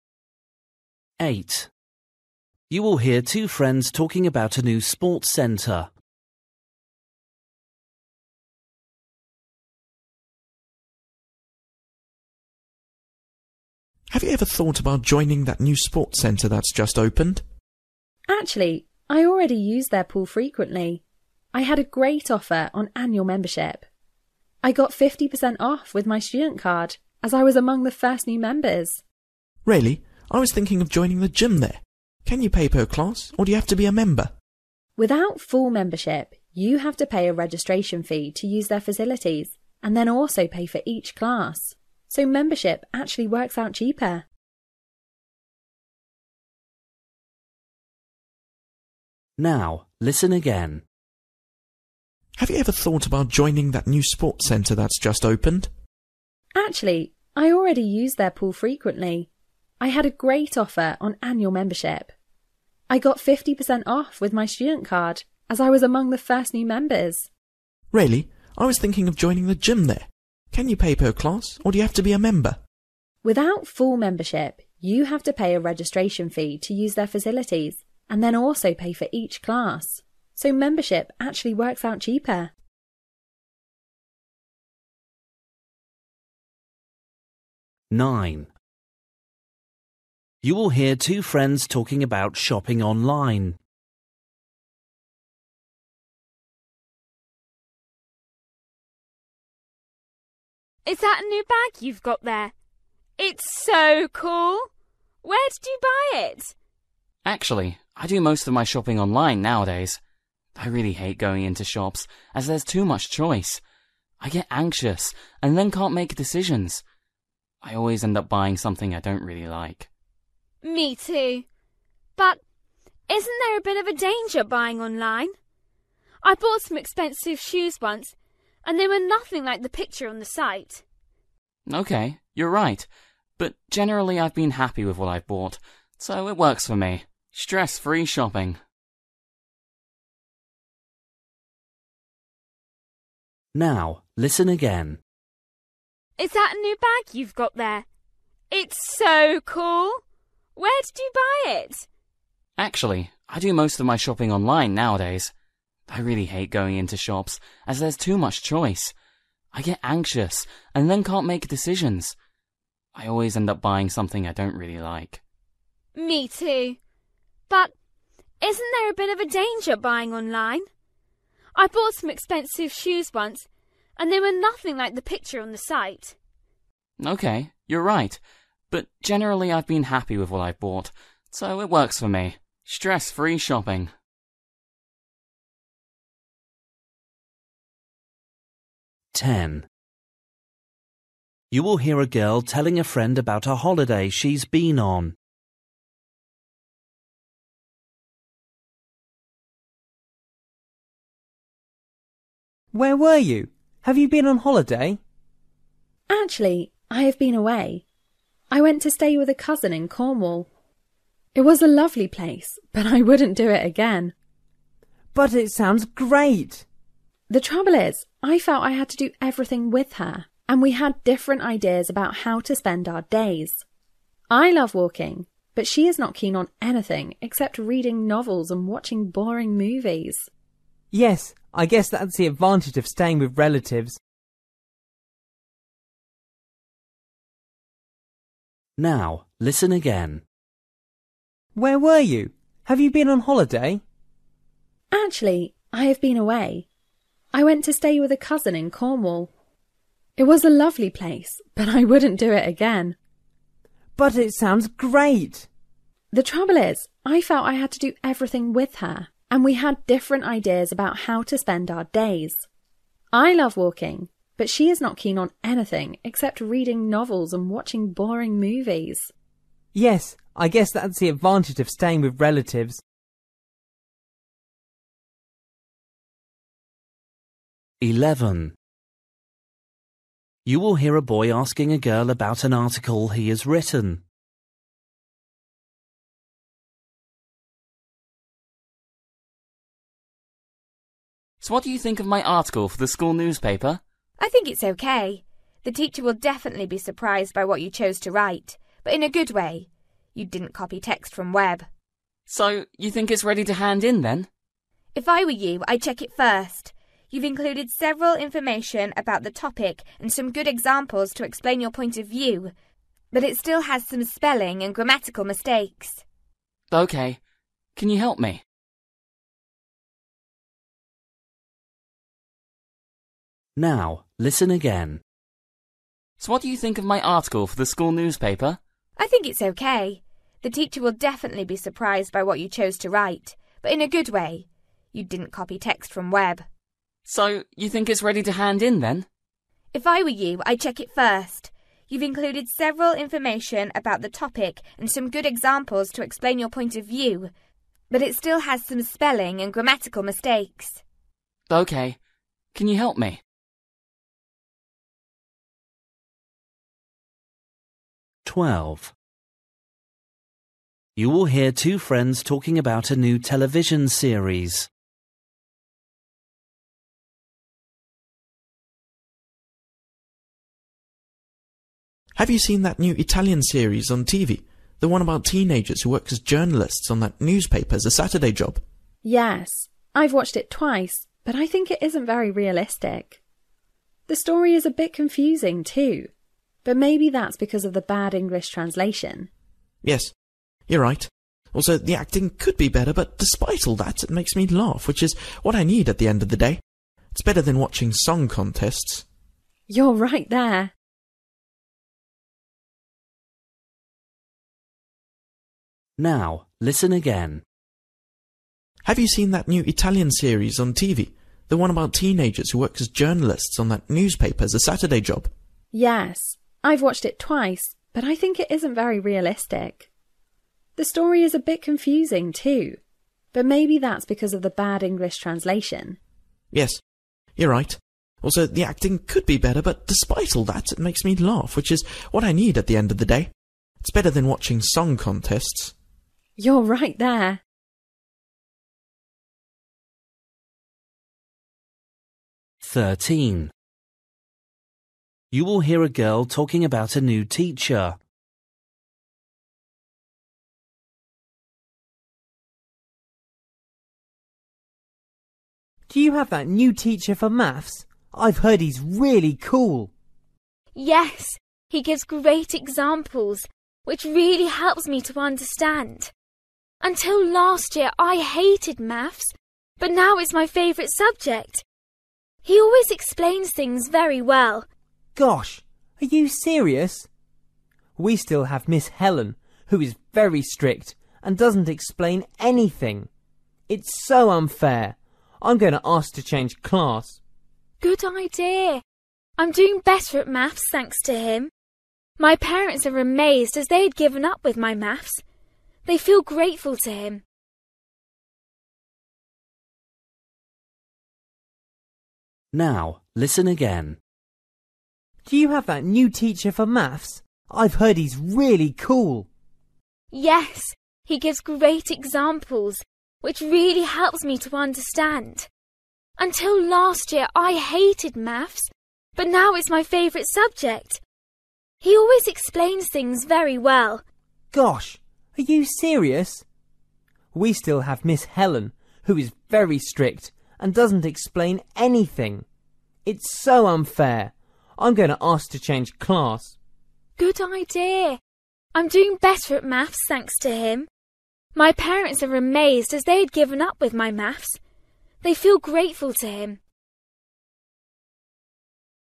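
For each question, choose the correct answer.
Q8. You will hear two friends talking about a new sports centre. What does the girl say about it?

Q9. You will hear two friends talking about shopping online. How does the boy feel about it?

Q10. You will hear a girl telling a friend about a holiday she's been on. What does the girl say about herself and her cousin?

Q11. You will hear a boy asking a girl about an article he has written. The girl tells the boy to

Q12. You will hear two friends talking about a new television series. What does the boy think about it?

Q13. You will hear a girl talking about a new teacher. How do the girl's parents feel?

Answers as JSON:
{"8": "She got a cheap annual membership as one of the first members.", "9": "He finds it stress-free compared with shops.", "10": "They have different interests.", "11": "check it for spelling and grammar mistakes", "12": "It is funny despite its faults.", "13": "grateful"}

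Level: Luyện nghe trình độ B1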